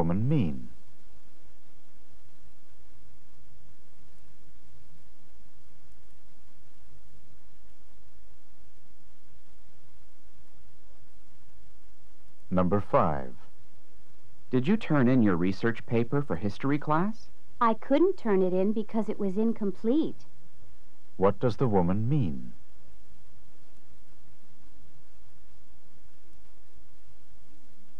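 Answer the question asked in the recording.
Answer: She didn't turn it in because it wasn't finished.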